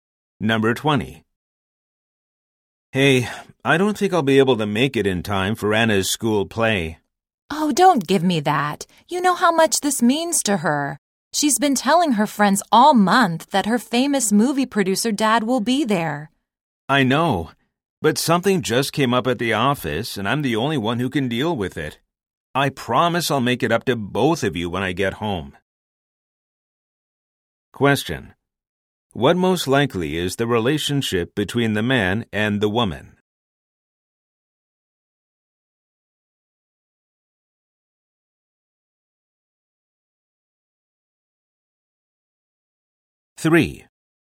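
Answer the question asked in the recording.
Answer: Husband and wife (Anna's parents)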